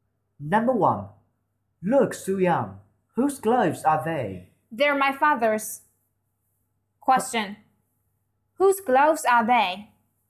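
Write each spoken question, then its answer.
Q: Whose gloves are they?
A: Su-young's father's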